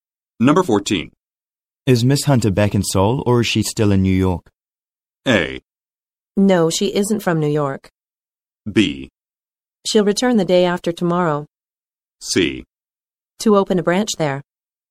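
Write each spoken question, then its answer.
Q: Is Miss Hunter back in Seoul or is she still in New York?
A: B: She'll return the day after tomorrow.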